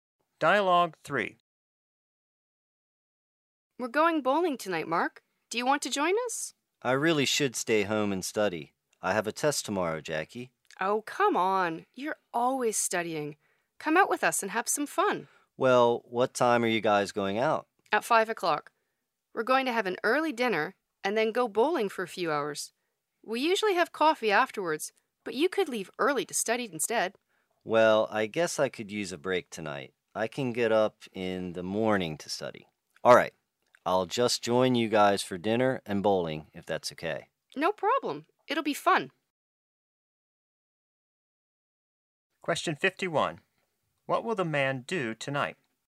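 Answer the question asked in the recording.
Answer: Have dinner and go bowling with friends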